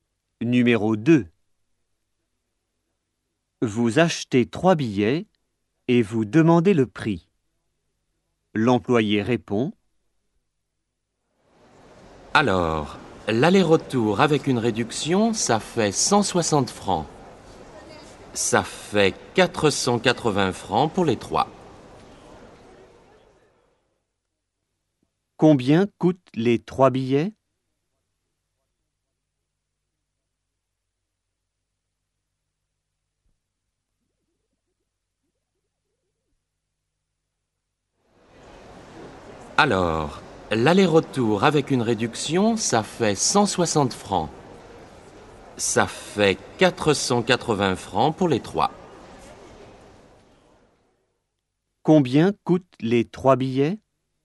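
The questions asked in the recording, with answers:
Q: Combien coûtent les trois billets ?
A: 480 francs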